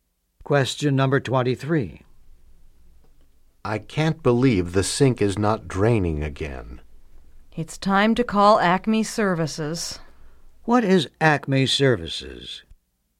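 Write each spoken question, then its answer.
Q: What is Acme Services?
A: A plumbing service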